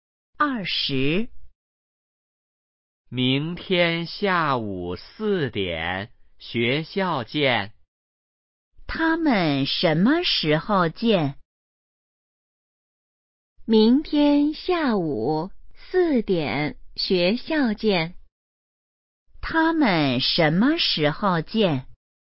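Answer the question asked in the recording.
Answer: 明天下午四点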